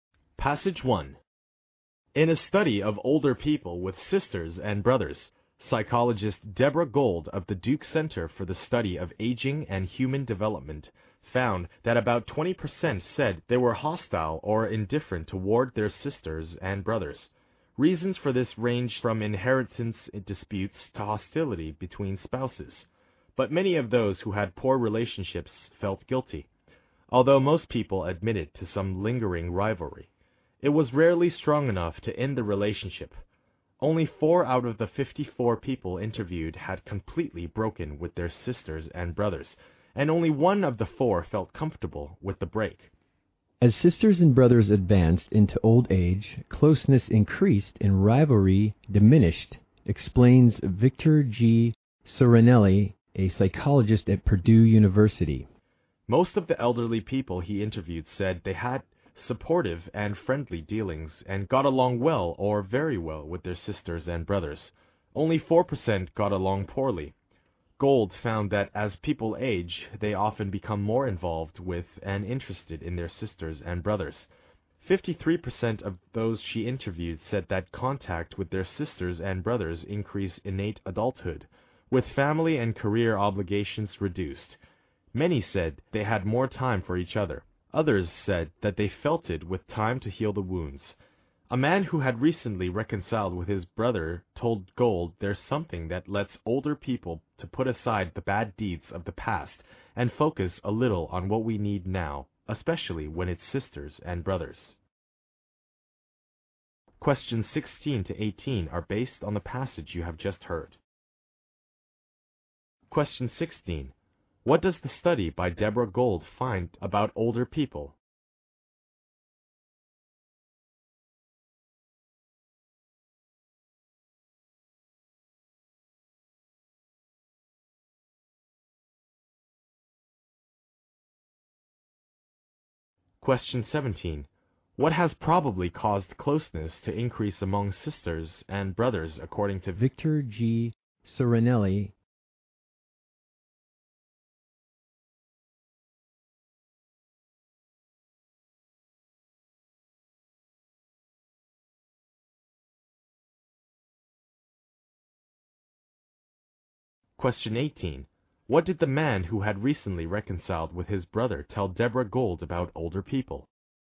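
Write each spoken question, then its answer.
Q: What does the study by Deborah Gold find about older people?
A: About 20% are hostile or indifferent toward their siblings.

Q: What did the man who had recently reconciled with his brother tell Deborah Gold about older people?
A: They can put aside past bad deeds and focus on present needs.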